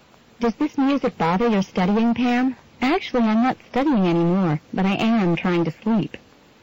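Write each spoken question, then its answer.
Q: What does Pam imply?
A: The music is keeping her from sleeping.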